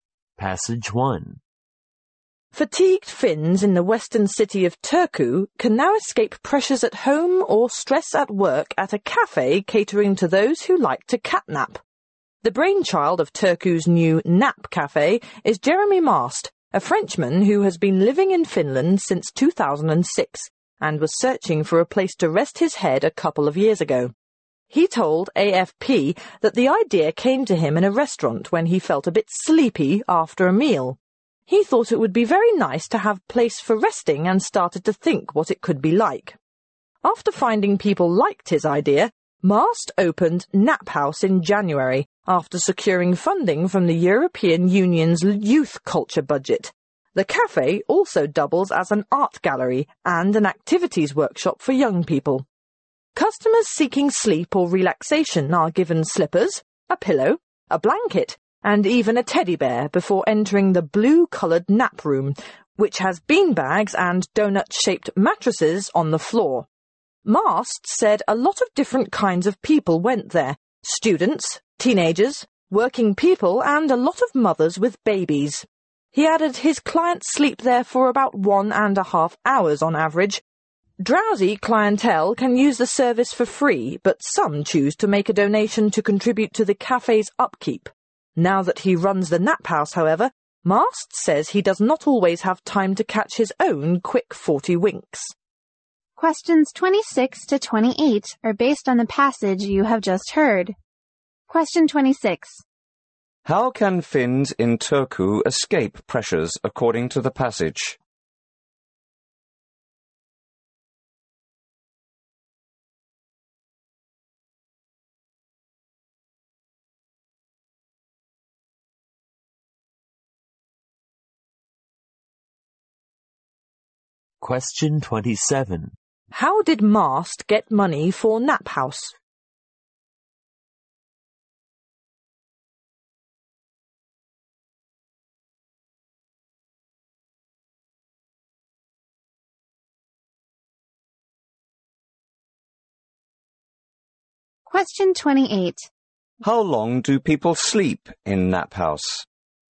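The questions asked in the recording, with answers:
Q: How can Finns in Turku escape pressures according to the passage?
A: By taking a nap at a nap cafe

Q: How did Mast get money for Nap House?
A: From the European Union's Youth Culture Budget

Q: How long do people sleep in Nap House?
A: About 1.5 hours on average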